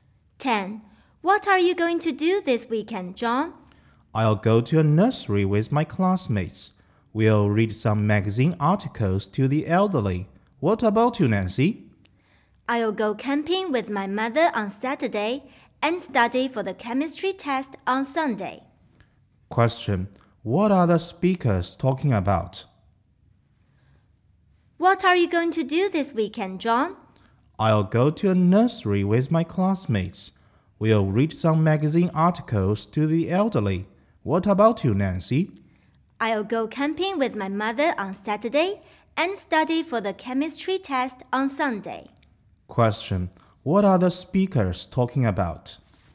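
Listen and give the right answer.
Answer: Their weekend plans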